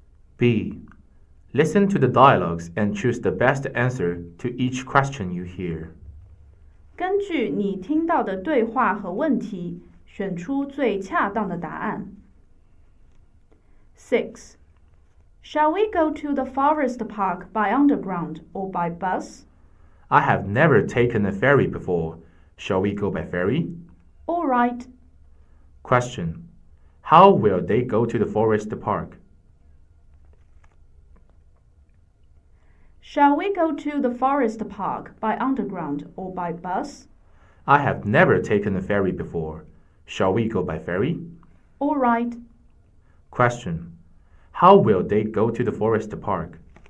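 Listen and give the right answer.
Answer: By ferry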